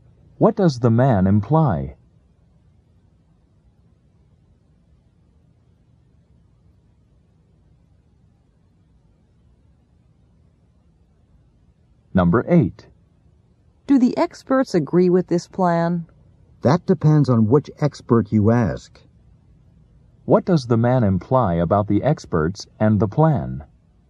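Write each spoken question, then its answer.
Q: What does the man imply about the experts and the plan?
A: The experts don't all agree about the plan.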